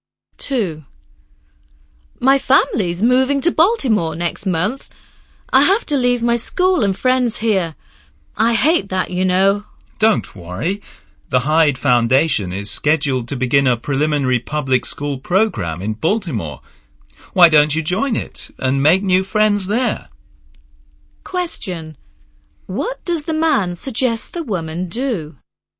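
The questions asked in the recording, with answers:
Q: What does the man suggest the woman do?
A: Join the Hyde Foundation's public school program in Baltimore and make new friends there.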